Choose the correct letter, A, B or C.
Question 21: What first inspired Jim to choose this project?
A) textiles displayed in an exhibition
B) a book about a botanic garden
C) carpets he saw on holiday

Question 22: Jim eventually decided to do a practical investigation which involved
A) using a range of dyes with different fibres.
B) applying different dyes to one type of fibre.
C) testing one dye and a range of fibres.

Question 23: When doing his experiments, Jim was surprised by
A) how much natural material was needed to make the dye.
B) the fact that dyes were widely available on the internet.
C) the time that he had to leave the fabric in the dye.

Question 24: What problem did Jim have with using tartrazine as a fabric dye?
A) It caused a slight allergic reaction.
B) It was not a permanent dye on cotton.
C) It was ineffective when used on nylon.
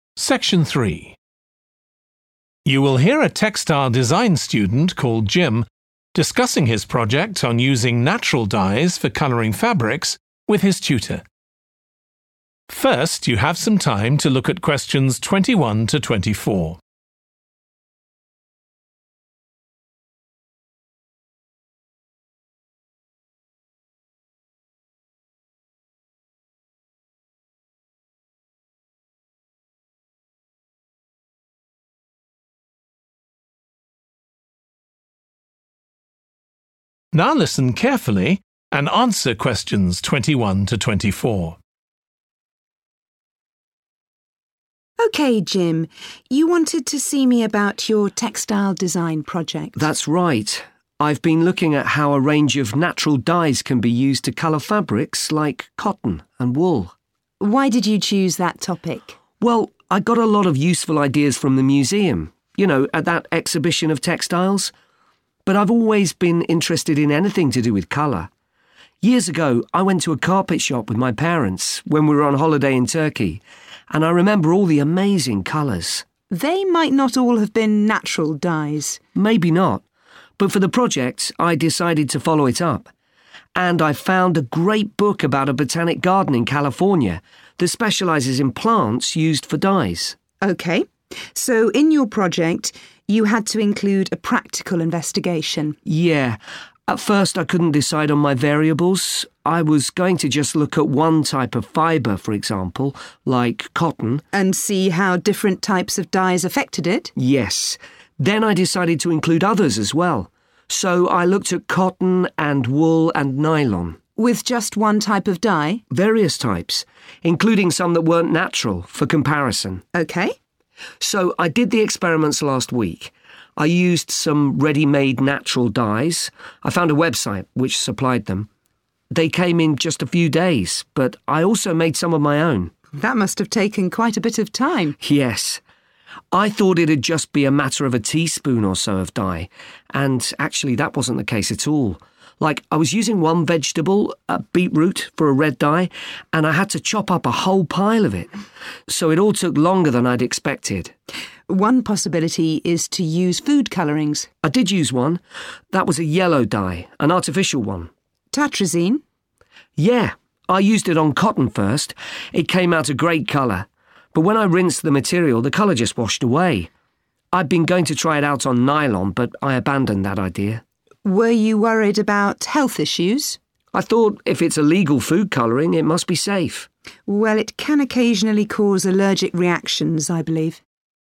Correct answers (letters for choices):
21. C
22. A
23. A
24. B

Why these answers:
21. I went to a carpet shop with my parents when we were on holiday in Turkey, and I remember all the amazing colours. Excerpt/Transcript Explanation: The transcript talks about a time when Jim went to a store selling carpets with his parents while they were on a trip to Turkey. He was amazed by the vibrant colors of the carpets. Answer Explanation: The answer 'C' implies that Jim was inspired by the colorful carpets he saw during his holiday in Turkey. Reason For Correctness: The correct answer is 'C' because the excerpt explicitly mentions Jim being impressed by the vibrant colors of the carpets he saw while on holiday. This experience sparked his interest in using natural dyes to color fabrics.
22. Then I decided to include others as well, so I looked at cotton and wool and nylon. Excerpt/Transcript Explanation: The transcript means that Jim looked at different materials such as cotton, wool, and nylon. Answer Explanation: The answer means that Jim used a range of dyes with different fibres. Reason For Correctness: The correct answer is A (using a range of dyes with different fibres) because Jim mentioned considering cotton, wool, and nylon, which indicates using different fibres for the investigation, aligning with the idea of using a range of dyes with different fibres.
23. Like I was using one vegetable, beetroot, for a red dye, and I had to chop up a whole pile of it. Excerpt/Transcript Explanation: The transcript talks about how Jim needed to use a large amount of beetroot, a natural material, to make the red dye. Answer Explanation: The answer indicates that Jim was surprised by how much natural material was required to make the dye. Reason For Correctness: The correct answer is 'A' because the excerpt clearly states that Jim had to chop up a whole pile of beetroot, showing that he needed a significant amount of natural material to create the dye. This aligns with the option A, which mentions the surprising amount of natural material needed for the dyeing process.
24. but when I rinsed the material, the colour just washed away. Excerpt/Transcript Explanation: The transcript shows that after Jim rinsed the material, the color came out and washed away. Answer Explanation: The answer indicates that the problem with using tartrazine as a fabric dye was that the color was not permanent and washed away easily on cotton. Reason For Correctness: The correct answer is 'B' because it aligns with the information provided in the excerpt where Jim mentioned that the color washed away when he rinsed the material, indicating that the dye was not permanent on cotton.

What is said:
TUTOR: OK, Jim. You wanted to see me about your textile design project.
JIM: That's right. I've been looking at how a range of natural dyes can be used to colour fabrics like cotton and wool.
TUTOR: Why did you choose that topic?
JIM: Well, I got a lot of useful ideas from the museum, you know, at that exhibition of textiles. But I've always been interested in anything to do with colour. Years ago, I went to a carpet shop with my parents when we were on holiday in Turkey, and I remember all the amazing colours.
TUTOR: They might not all have been natural dyes.
JIM: Maybe not, but for the project I decided to follow it up. And I found a great book about a botanic garden in California that specialises in plants used for dyes.
TUTOR: OK. So, in your project, you had to include a practical investigation.
JIM: Yeah. At first I couldn't decide on my variables. I was going to just look at one type of fibre for example, like cotton ...
TUTOR: ... and see how different types of dyes affected it?
JIM: Yes. Then I decided to include others as well, so I looked at cotton and wool and nylon.
TUTOR: With just one type of dye?
JIM: Various types, including some that weren't natural, for comparison.
TUTOR: OK.
JIM: So, I did the experiments last week. I used some ready-made natural dyes. I found a website which supplied them, they came in just a few days, but I also made some of my own.
TUTOR: That must have taken quite a bit of time.
JIM: Yes, I'd thought it'd just be a matter of a teaspoon or so of dye, and actually that wasn't the case at all. Like I was using one vegetable, beetroot, for a red dye, and I had to chop up a whole pile of it. So it all took longer than I'd expected.
TUTOR: One possibility is to use food colourings.
JIM: I did use one. That was a yellow dye, an artificial one.
JIM: Yeah. I used it on cotton first. It came out a great colour, but when I rinsed the material, the colour just washed away. I'd been going to try it out on nylon, but I abandoned that idea.
TUTOR: Were you worried about health issues?
JIM: I'd thought if it's a legal food colouring, it must be safe.
TUTOR: Well, it can occasionally cause allergic reactions, I believe.